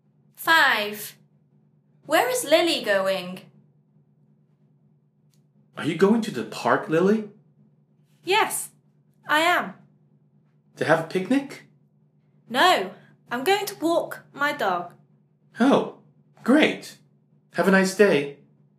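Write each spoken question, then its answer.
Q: Where is Lily going?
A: to the park to walk her dog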